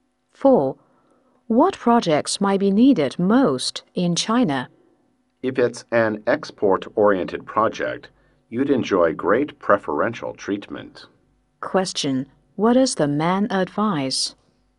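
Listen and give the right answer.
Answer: An export-oriented project, which would enjoy great preferential treatment.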